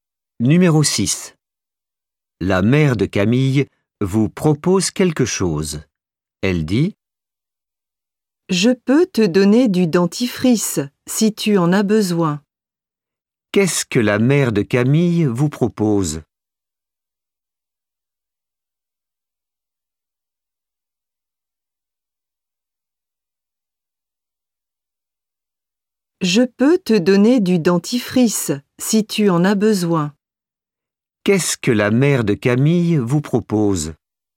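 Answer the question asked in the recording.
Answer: Du dentifrice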